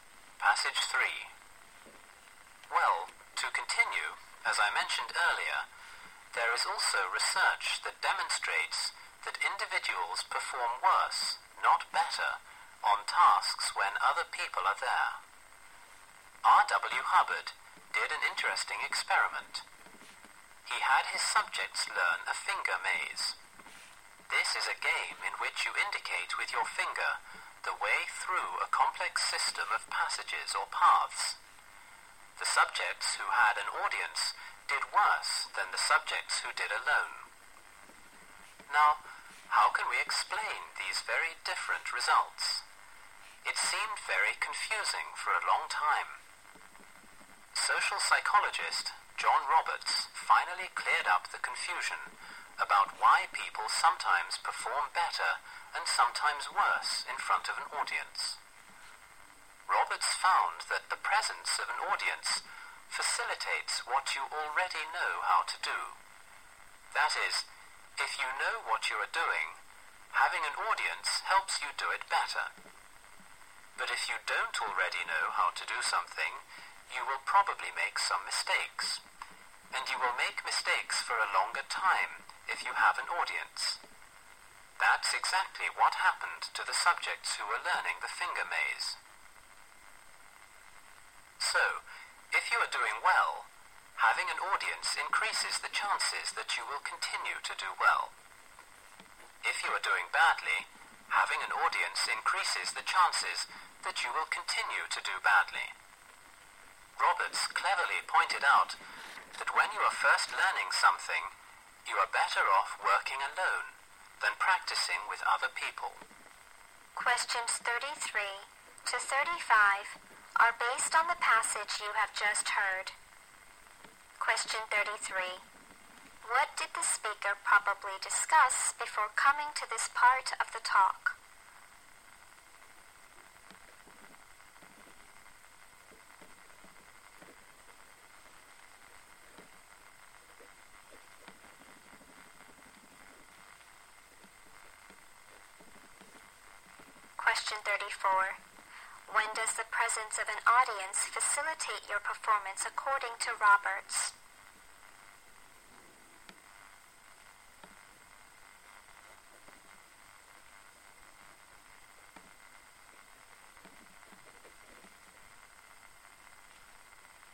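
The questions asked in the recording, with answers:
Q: When does the presence of an audience facilitate your performance according to Roberts?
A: When you already know how to do the task.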